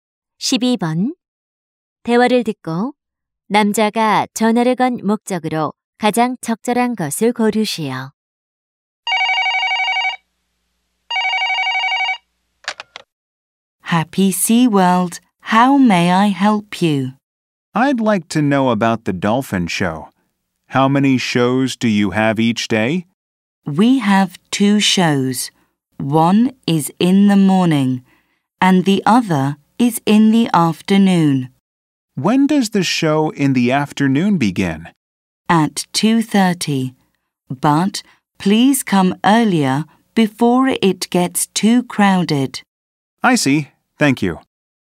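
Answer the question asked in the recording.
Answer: 돌고래 쇼 시간을 문의하려고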